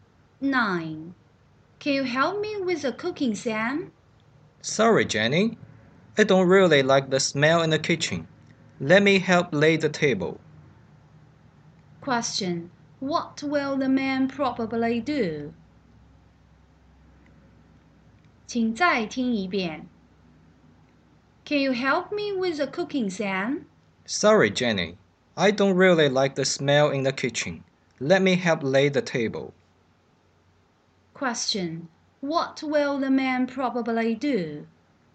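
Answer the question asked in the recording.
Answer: Help lay the table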